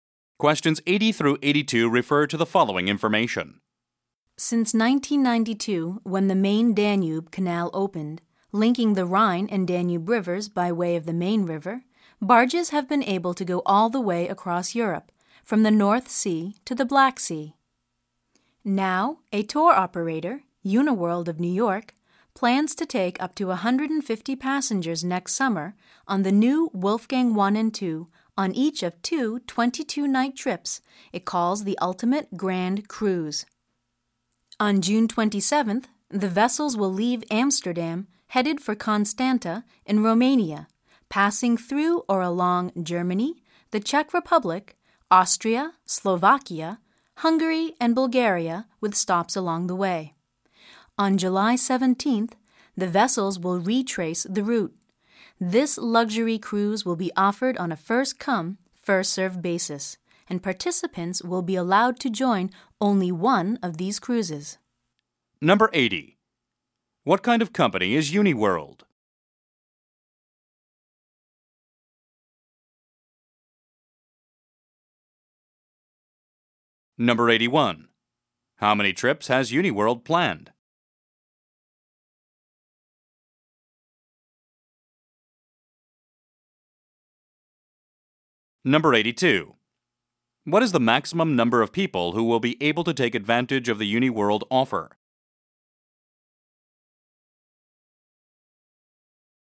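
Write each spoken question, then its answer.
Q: What kind of company is UniWorld?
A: A tour operator

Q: How many trips has UniWorld planned?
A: Two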